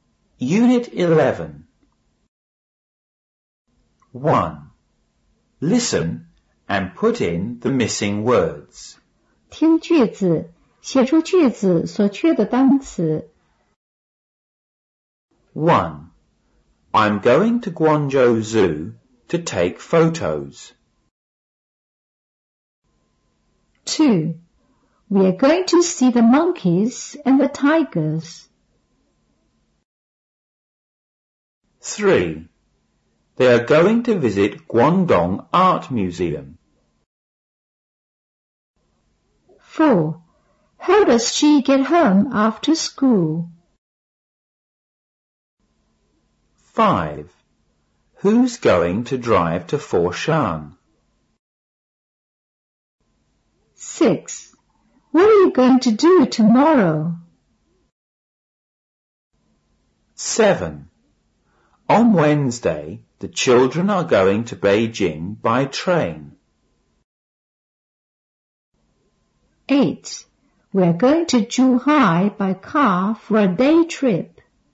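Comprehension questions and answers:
1.Listen and put in the missing words.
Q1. I'm going to Guangzhou ( ) to ( ) photos.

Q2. We're going to see the ( ) and the ( ).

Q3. They're going to ( ) Guangdong ( ) Museum.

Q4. How does she ( ) ( ) after school?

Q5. ( ) going to ( ) to Foshan?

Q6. ( ) are you going to do ( )?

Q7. On ( ) the children are going to Beijing by ( ).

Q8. We're going to Zhuhai by ( ) ( ) a day trip.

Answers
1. Zoo; take
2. monkeys; tigers
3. visit; Art
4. get; home
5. Who's; drive
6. What; tomorrow
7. Wednesday; train
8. car; for

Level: 五年级上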